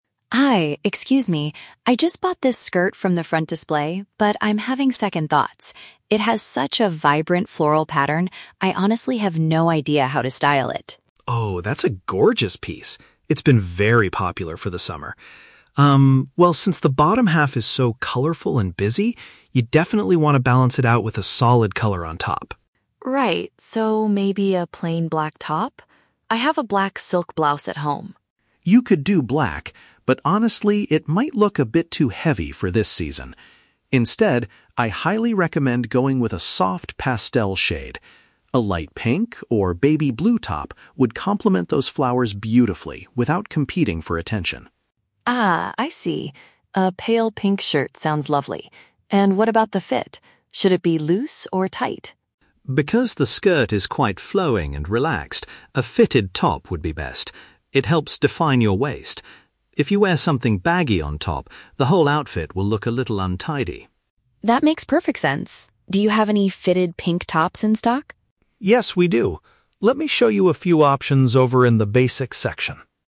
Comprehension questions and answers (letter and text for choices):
Listen to the conversation between a customer and a store stylist. For each question, choose the correct answer (A, B, or C).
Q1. Why is the customer asking the stylist for help?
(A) She needs advice on choosing an outfit for a summer beach party.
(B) She doesn't know how to match her new brightly colored skirt.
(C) She wants to return a floral blouse because the pattern is too busy.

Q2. Which type of top does the stylist finally suggest the customer wear?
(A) A plain black silk blouse.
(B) A pale-colored, tight-fitting shirt.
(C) A loose, baggy sweater.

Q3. Why does the stylist recommend a top that stays close to the body?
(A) To create a better shape since the skirt is already loose.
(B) Because oversized clothes are currently considered out of fashion.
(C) Because the store only has tight shirts available in the basics section.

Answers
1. (B) She doesn't know how to match her new brightly colored skirt.
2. (B) A pale-colored, tight-fitting shirt.
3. (A) To create a better shape since the skirt is already loose.

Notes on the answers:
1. The customer says she bought a skirt with a "vibrant floral pattern" (paraphrased as "brightly colored") and has "no idea how to style it" (doesn't know how to match it). Option A is a trap; "summer" is mentioned, but she never mentions a party. Option C is a trap; she bought a skirt, not a blouse.
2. The stylist recommends a "soft pastel shade" like "light pink or baby blue" (paraphrased as pale-colored) and says a "fitted top" (tight-fitting) would be best. Option A is the trap; the customer suggests a black silk blouse, but the stylist rejects it because it looks "too heavy." Option C is a trap; the stylist mentions "baggy," but warns that it will make the outfit look "untidy."
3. The stylist explains that the skirt is "quite flowing and relaxed" (loose), so a fitted top helps "define your waist" (create a better shape). Option B is a plausible real-world fashion rule but is not mentioned in the audio. Option C is a trap; they go to the basics section, but there is no mention that they only sell tight shirts there.

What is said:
Customer: Hi, excuse me. I just bought this skirt from the front display, but I'm having second thoughts. It has such a vibrant floral pattern. I honestly have no idea how to style it.
Stylist: Oh, that's a gorgeous piece! It's been very popular for the summer. Um, well, since the bottom half is so colorful and busy, you definitely want to balance it out with a solid color on top.
Customer: Right. So, maybe a plain black top? I have a black silk blouse at home.
Stylist: You could do black, but honestly, it might look a bit too heavy for this season. Instead, I highly recommend going with a soft pastel shade. A light pink or baby blue top would complement those flowers beautifully without competing for attention.
Customer: Ah, I see. A pale pink shirt sounds lovely. And what about the fit? Should it be loose or tight?
Stylist: Because the skirt is quite flowing and relaxed, a fitted top would be best. It helps define your waist. If you wear something baggy on top, the whole outfit will look a little untidy.
Customer: That makes perfect sense. Do you have any fitted pink tops in stock?